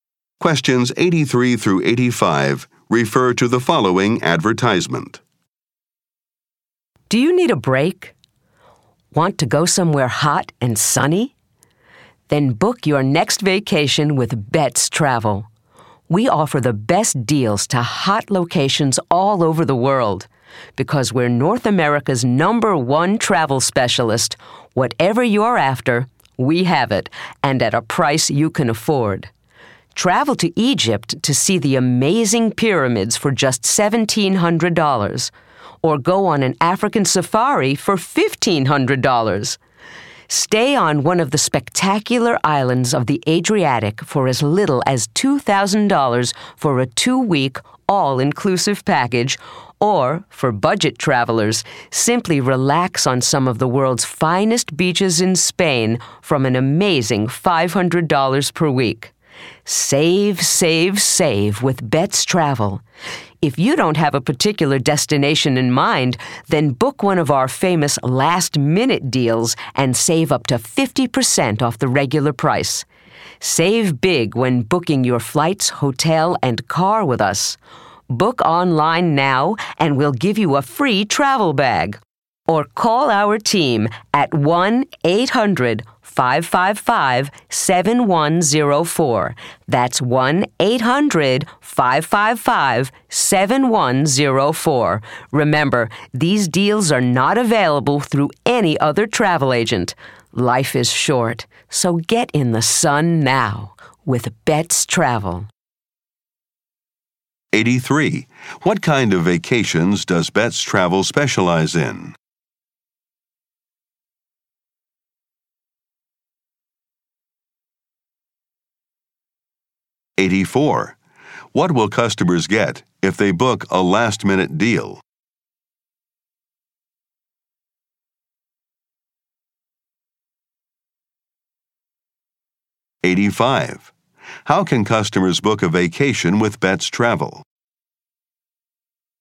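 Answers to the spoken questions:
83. Trips to hot, sunny places
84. Up to 50% off the regular price
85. Online or by phone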